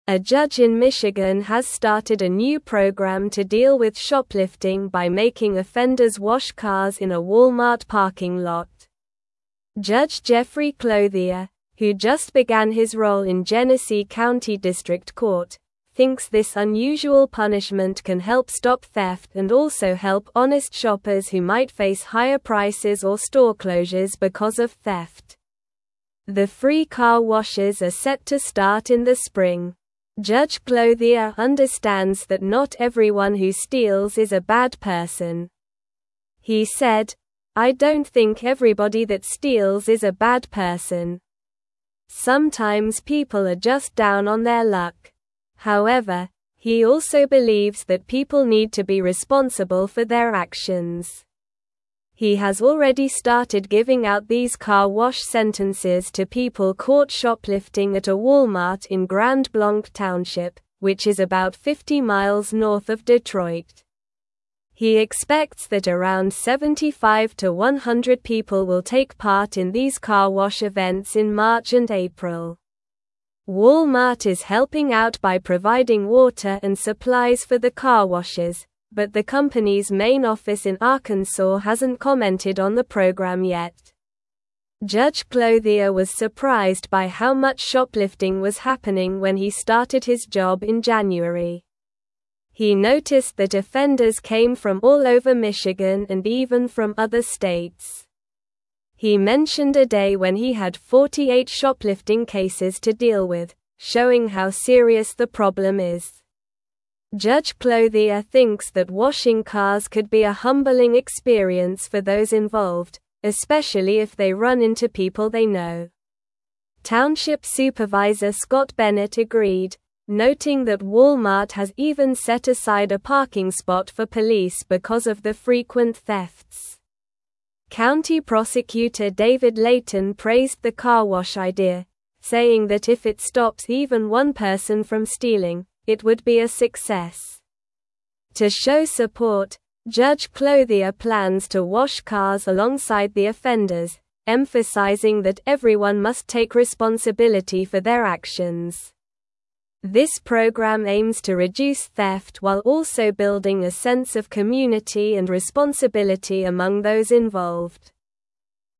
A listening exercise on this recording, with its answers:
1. A judge in Michigan has started a new program to deal with shoplifting by making offenders wash cars in a (1)______ parking lot.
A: Walmart

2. Judge Jeffrey (2)______, who just (3)______ his role in Genesee County District Court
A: Clothier

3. Judge Jeffrey (2)______, who just (3)______ his role in Genesee County District Court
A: began

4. thinks this unusual punishment can help stop theft and also help (4)______ shoppers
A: honest

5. He said, "I don't think everybody that steals is a bad (5)______.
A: person

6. He has already started giving out these car wash (6)______ to people caught (7)______ at a Walmart in Grand Blanc Township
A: sentences

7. He has already started giving out these car wash (6)______ to people caught (7)______ at a Walmart in Grand Blanc Township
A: shoplifting

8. which is about 50 miles north of (8)______.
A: Detroit

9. (9)______ Clothier was surprised by how much shoplifting was happening when he started his job in (10)______.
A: Judge

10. (9)______ Clothier was surprised by how much shoplifting was happening when he started his job in (10)______.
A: January

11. He (11)______ a day when he had 48 shoplifting (12)______ to deal with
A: mentioned

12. He (11)______ a day when he had 48 shoplifting (12)______ to deal with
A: cases

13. Township Supervisor Scott Bennett (13)______, noting that Walmart has even set aside a (14)______ spot for police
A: agreed

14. Township Supervisor Scott Bennett (13)______, noting that Walmart has even set aside a (14)______ spot for police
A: parking

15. (15)______ Prosecutor David Leyton praised the car wash idea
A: County

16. This (16)______ aims to reduce theft while also building a sense of community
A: program

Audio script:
A judge in Michigan has started a new program to deal with shoplifting by making offenders wash cars in a Walmart parking lot. Judge Jeffrey Clothier, who just began his role in Genesee County District Court, thinks this unusual punishment can help stop theft and also help honest shoppers who might face higher prices or store closures because of theft. The free car washes are set to start in the spring.
Judge Clothier understands that not everyone who steals is a bad person. He said, "I don't think everybody that steals is a bad person. Sometimes people are just down on their luck." However, he also believes that people need to be responsible for their actions. He has already started giving out these car wash sentences to people caught shoplifting at a Walmart in Grand Blanc Township, which is about 50 miles north of Detroit. He expects that around 75 to 100 people will take part in these car wash events in March and April.
Walmart is helping out by providing water and supplies for the car washes, but the company's main office in Arkansas hasn't commented on the program yet. Judge Clothier was surprised by how much shoplifting was happening when he started his job in January. He noticed that offenders came from all over Michigan and even from other states. He mentioned a day when he had 48 shoplifting cases to deal with, showing how serious the problem is.
Judge Clothier thinks that washing cars could be a humbling experience for those involved, especially if they run into people they know. Township Supervisor Scott Bennett agreed, noting that Walmart has even set aside a parking spot for police because of the frequent thefts. County Prosecutor David Leyton praised the car wash idea, saying that if it stops even one person from stealing, it would be a success. To show support, Judge Clothier plans to wash cars alongside the offenders, emphasizing that everyone must take responsibility for their actions. This program aims to reduce theft while also building a sense of community and responsibility among those involved.

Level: Level 3